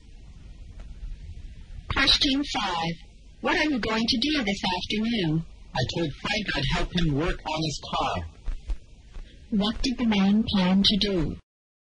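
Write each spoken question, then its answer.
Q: What did the man plan to do?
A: Help Frank work on his car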